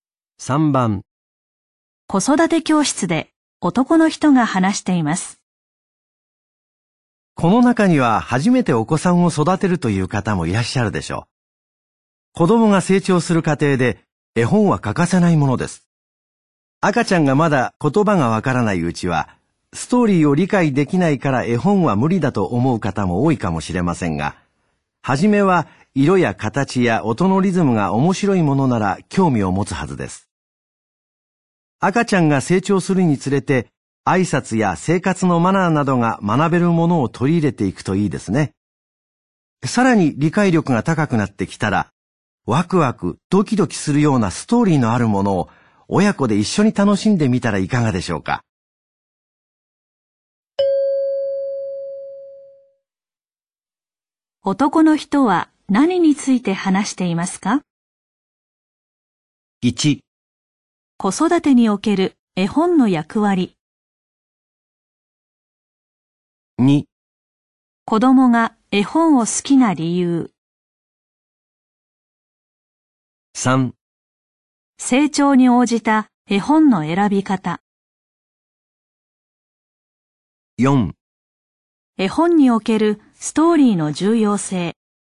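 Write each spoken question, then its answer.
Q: 男の人は何について話していますか?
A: 3: 成長に応じた絵本の選び方。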